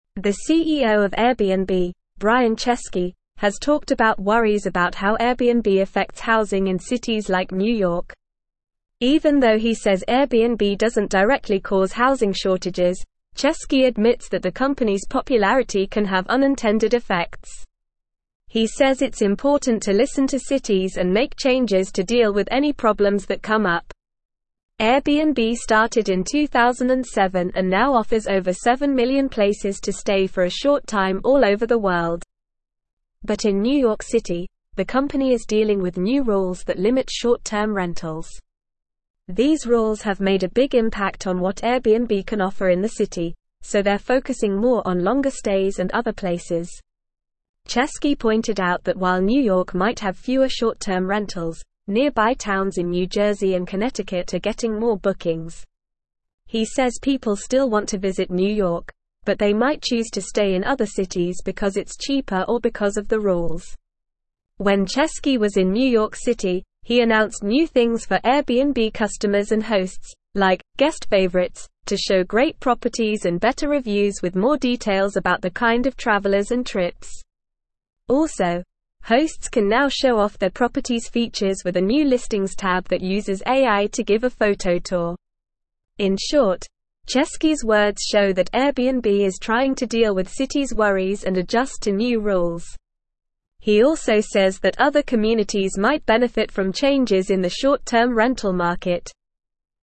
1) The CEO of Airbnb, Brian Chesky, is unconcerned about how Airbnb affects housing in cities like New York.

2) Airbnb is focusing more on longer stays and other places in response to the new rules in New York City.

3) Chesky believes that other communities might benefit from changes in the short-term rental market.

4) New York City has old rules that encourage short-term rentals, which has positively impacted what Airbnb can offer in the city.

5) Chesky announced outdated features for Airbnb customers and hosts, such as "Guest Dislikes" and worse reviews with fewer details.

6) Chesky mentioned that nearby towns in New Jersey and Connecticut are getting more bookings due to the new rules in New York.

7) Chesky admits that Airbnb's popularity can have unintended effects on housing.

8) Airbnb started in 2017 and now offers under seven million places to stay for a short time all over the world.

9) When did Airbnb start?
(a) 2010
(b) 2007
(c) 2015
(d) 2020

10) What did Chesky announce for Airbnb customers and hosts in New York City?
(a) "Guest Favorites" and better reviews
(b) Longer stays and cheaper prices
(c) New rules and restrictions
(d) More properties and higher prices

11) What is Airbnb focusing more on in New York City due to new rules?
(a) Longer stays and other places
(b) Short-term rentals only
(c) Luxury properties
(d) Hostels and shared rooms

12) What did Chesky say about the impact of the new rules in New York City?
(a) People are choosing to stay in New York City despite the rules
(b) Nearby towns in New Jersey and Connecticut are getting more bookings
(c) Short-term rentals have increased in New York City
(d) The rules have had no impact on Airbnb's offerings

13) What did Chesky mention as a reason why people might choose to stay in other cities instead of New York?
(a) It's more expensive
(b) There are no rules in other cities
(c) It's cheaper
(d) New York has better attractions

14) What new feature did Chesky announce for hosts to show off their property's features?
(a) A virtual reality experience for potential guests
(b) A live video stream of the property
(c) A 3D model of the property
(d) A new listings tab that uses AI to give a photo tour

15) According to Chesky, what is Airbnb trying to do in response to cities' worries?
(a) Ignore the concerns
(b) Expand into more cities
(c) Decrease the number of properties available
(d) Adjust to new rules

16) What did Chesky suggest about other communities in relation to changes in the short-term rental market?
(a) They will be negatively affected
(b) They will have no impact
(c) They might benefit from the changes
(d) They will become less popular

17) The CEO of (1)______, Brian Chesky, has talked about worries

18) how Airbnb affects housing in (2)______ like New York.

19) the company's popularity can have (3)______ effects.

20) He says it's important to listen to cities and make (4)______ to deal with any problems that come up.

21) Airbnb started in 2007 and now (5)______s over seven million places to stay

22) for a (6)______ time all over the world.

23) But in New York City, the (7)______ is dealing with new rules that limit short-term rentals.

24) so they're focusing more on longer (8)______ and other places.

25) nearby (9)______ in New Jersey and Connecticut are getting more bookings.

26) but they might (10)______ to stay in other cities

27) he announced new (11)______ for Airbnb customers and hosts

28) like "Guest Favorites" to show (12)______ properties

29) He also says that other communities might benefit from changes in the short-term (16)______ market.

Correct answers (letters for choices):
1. False
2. True
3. True
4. False
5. False
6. True
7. True
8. False
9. b
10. a
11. a
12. b
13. c
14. d
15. d
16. c
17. Airbnb
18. cities
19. unintended
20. changes
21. offer
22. short
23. company
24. stays
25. towns
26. choose
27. things
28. great
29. rental

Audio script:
The CEO of Airbnb, Brian Chesky, has talked about worries about how Airbnb affects housing in cities like New York. Even though he says Airbnb doesn't directly cause housing shortages, Chesky admits that the company's popularity can have unintended effects. He says it's important to listen to cities and make changes to deal with any problems that come up.
Airbnb started in 2007 and now offers over seven million places to stay for a short time all over the world. But in New York City, the company is dealing with new rules that limit short-term rentals. These rules have made a big impact on what Airbnb can offer in the city, so they're focusing more on longer stays and other places.
Chesky pointed out that while New York might have fewer short-term rentals, nearby towns in New Jersey and Connecticut are getting more bookings. He says people still want to visit New York, but they might choose to stay in other cities because it's cheaper or because of the rules.
When Chesky was in New York City, he announced new things for Airbnb customers and hosts, like "Guest Favorites" to show great properties and better reviews with more details about the kind of travelers and trips. Also, hosts can now show off their property's features with a new listings tab that uses AI to give a photo tour.
In short, Chesky's words show that Airbnb is trying to deal with cities' worries and adjust to new rules. He also says that other communities might benefit from changes in the short-term rental market.

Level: Level 3